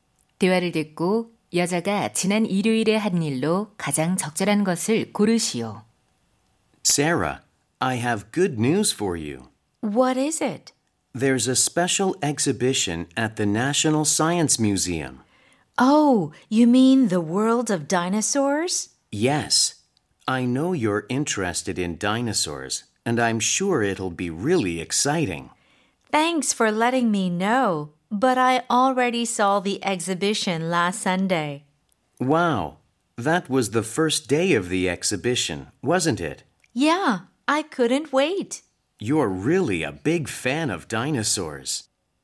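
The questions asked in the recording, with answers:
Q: 대화를 듣고 여자가 지난 일요일에 한 일로 가장 적절한 것을 고르시오.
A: 공룡 특별 전시회 관람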